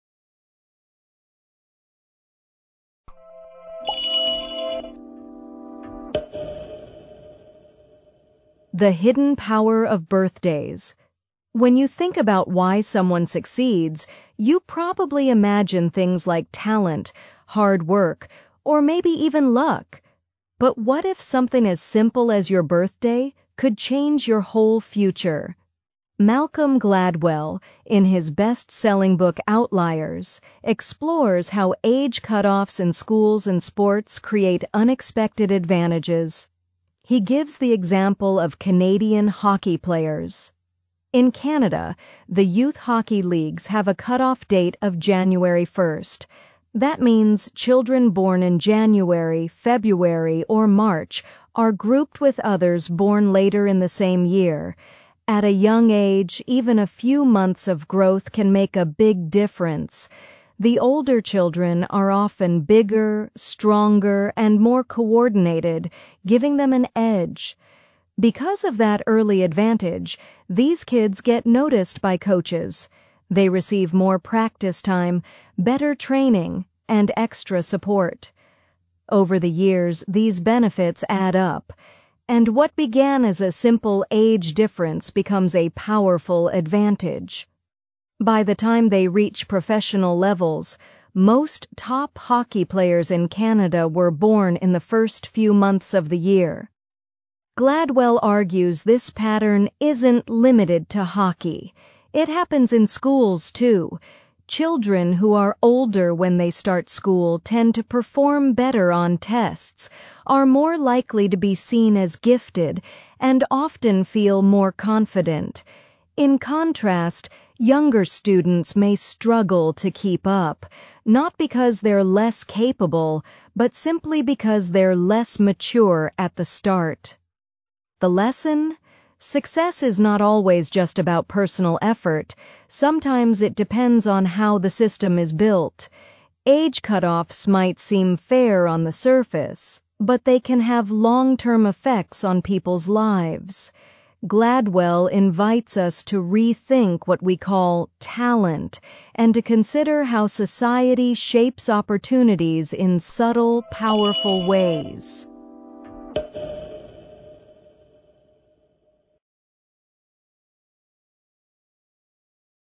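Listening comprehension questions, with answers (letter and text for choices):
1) What is the MAIN IDEA of this passage?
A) Birthdays are important in predicting someone's personality.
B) Older students are always more intelligent than younger students.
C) Small age differences can create big advantages due to how systems are structured.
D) Hard work is more important than any other factor in success.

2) According to the text, why do children born earlier in the year often succeed more in Canadian hockey?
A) They have better coaches.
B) They practice harder than others.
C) They are naturally more talented.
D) They are older, and that gives them an early advantage.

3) What does the author mean when he says "the system is built" in the final paragraph?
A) People are responsible for their own failures.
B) Society unintentionally creates unfair advantages.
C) Coaches choose players based on effort only.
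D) Children learn everything from the system.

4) Which example best supports the author's argument?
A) A student who does well in math because he studies every night.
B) A child born in December struggling in class compared to older classmates.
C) A hockey coach picking players randomly.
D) A birthday party for a talented student.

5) In the passage, what does the word "cutoff date" most nearly mean?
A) The date when sports competitions end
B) The birthday limit used to organize groups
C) A date when schools close for holidays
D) The age when children become adults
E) A special national celebration day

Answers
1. C) Small age differences can create big advantages due to how systems are structured.
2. D) They are older, and that gives them an early advantage.
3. B) Society unintentionally creates unfair advantages.
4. B) A child born in December struggling in class compared to older classmates.
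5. B) The birthday limit used to organize groups

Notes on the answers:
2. Procure no texto uma explicação baseada em age difference, não em effort or talent.
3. Observe que o autor discute how society organizes opportunities.
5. Observe que a frase aparece quando o autor explica how children are grouped by age.

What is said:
When you think about why someone succeeds, you probably imagine things like talent, hard work, or maybe even luck. But what if something as simple as your birthday could change your whole future?
Malcolm Gladwell, in his best-selling book Outliers, explores how age cutoffs in schools and sports create unexpected advantages. He gives the example of Canadian hockey players. In Canada, the youth hockey leagues have a cutoff date of January 1st. That means children born in January, February, or March are grouped with others born later in the same year. At a young age, even a few months of growth can make a big difference. 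The older children are often bigger, stronger, and more coordinated, giving them an edge.
Because of that early advantage, these kids get noticed by coaches. They receive more practice time, better training, and extra support. Over the years, these benefits add up, and what began as a simple age difference becomes a powerful advantage. By the time they reach professional levels, most top hockey players in Canada were born in the first few months of the year.
Gladwell argues this pattern isn't limited to hockey. It happens in schools, too. Children who are older when they start school tend to perform better on tests, are more likely to be seen as gifted, and often feel more confident. In contrast, younger students may struggle to keep up—not because they're less capable, but simply because they're less mature at the start.
The lesson? Success is not always just about personal effort. Sometimes, it depends on how the system is built. 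Age cutoffs might seem fair on the surface, but they can have long-term effects on people's lives. Gladwell invites us to rethink what we call "talent" and to consider how society shapes opportunities in subtle, powerful ways.

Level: B2 (Upper-Intermediate)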